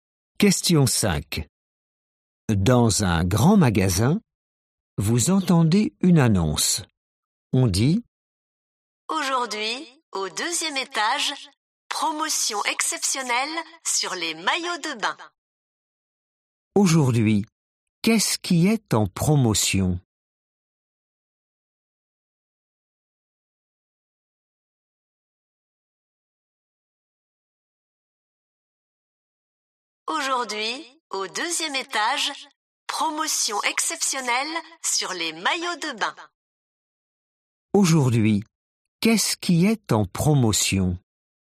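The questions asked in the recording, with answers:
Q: Aujourd'hui, qu'est-ce qui est en promotion?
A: Les maillots de bain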